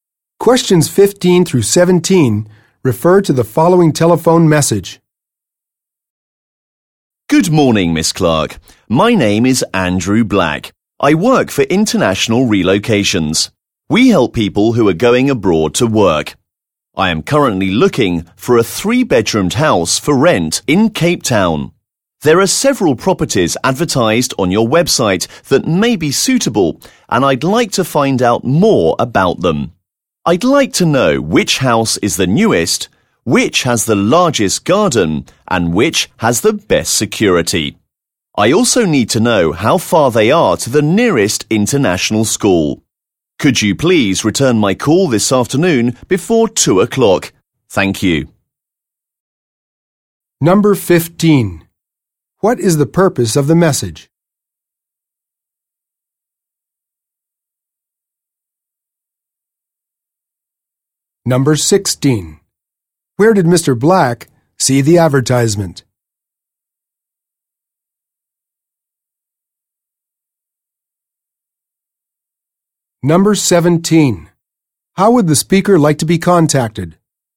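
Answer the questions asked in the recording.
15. To get more information about houses for rent
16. On Miss Clark's website
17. By phone, before 2 o'clock this afternoon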